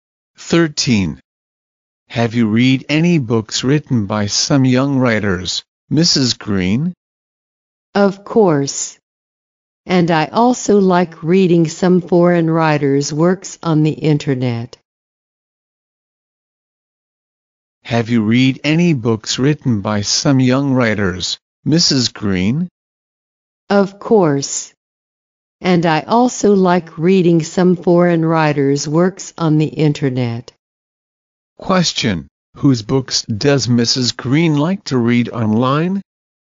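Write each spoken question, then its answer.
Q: Whose books does Mrs. Green like to read online?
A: Foreign writers'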